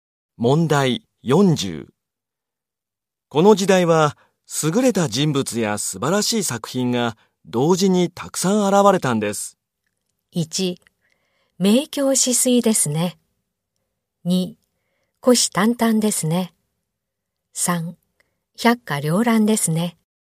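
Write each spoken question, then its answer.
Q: この時代は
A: 3: 百花繚乱ですね。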